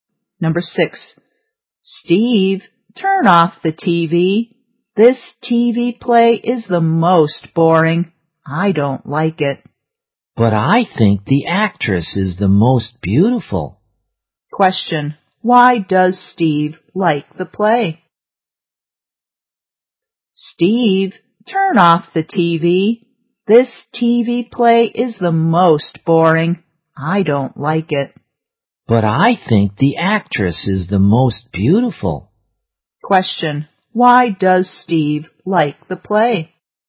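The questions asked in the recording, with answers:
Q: Question, why does Steve like the play?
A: Because he thinks the actress is the most beautiful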